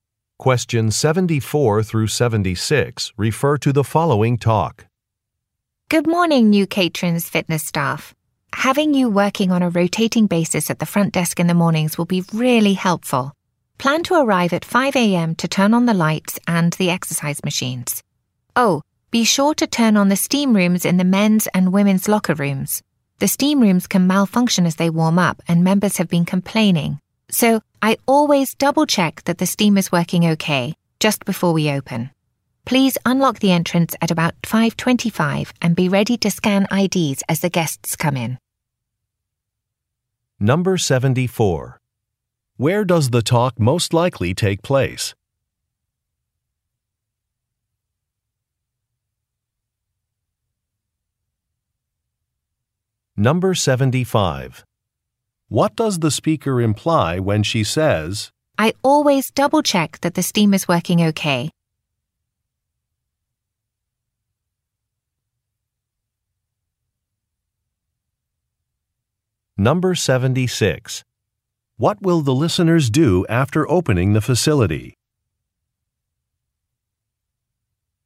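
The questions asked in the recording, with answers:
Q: Where does the talk most likely take place?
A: At a fitness center

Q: What will the listeners do after opening the facility?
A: Scan guests' IDs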